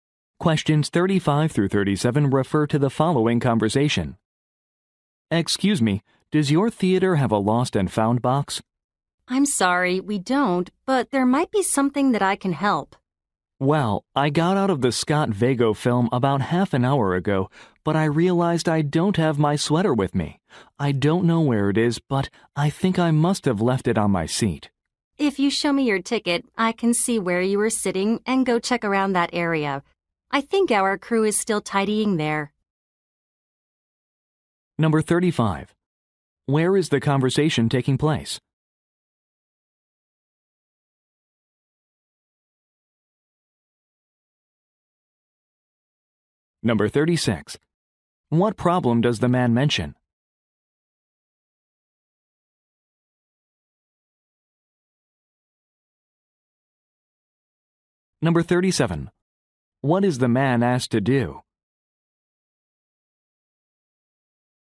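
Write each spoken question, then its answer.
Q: Where is the conversation taking place?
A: At a movie theater

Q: What problem does the man mention?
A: He lost his sweater

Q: What is the man asked to do?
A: Show his ticket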